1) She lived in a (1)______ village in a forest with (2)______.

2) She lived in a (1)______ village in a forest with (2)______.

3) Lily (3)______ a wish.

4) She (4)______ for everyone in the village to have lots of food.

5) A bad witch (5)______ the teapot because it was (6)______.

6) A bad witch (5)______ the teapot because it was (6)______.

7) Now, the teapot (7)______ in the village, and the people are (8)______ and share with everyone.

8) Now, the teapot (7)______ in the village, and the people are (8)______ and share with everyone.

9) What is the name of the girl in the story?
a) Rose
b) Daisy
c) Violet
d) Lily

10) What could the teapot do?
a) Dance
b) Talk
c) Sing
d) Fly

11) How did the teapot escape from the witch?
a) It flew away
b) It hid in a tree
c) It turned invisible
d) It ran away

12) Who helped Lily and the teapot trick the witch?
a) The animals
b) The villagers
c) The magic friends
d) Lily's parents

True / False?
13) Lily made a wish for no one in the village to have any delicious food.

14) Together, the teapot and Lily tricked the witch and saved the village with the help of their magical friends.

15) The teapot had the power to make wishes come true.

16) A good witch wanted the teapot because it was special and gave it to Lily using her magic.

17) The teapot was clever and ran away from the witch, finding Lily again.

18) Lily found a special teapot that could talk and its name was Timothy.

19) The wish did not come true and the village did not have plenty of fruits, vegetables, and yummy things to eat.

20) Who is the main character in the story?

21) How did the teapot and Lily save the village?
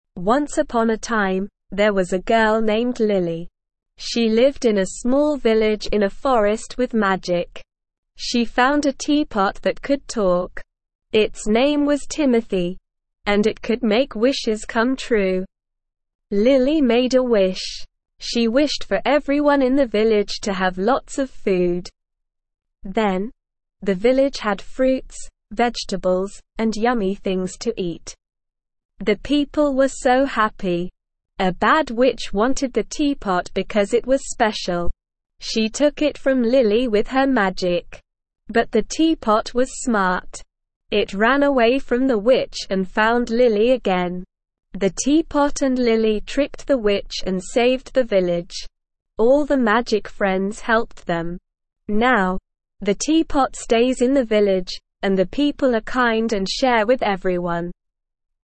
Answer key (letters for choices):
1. small
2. magic
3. made
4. wished
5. wanted
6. special
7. stays
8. kind
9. d
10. b
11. d
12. c
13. False
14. True
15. True
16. False
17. True
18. True
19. False
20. Lily.
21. The teapot and Lily tricked the witch and with the help of their magic friends, they saved the village.

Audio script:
Once upon a time, there was a girl named Lily. She lived in a small village in a forest with magic. She found a teapot that could talk. Its name was Timothy, and it could make wishes come true.
Lily made a wish. She wished for everyone in the village to have lots of food. Then, the village had fruits, vegetables, and yummy things to eat. The people were so happy.
A bad witch wanted the teapot because it was special. She took it from Lily with her magic. But the teapot was smart. It ran away from the witch and found Lily again.
The teapot and Lily tricked the witch and saved the village. All the magic friends helped them. Now, the teapot stays in the village, and the people are kind and share with everyone.

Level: Level 1